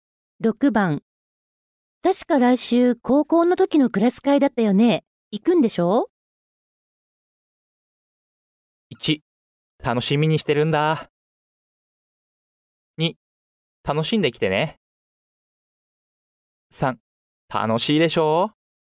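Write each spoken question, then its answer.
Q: 確か来週高校の時のクラス会だったよね。行くんでしょ?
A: 1: 楽しみにしてるんだ。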